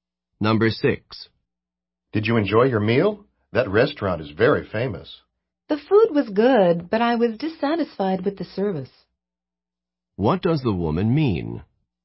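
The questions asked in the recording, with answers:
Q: What does the woman mean?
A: The food was good, but the service was poor.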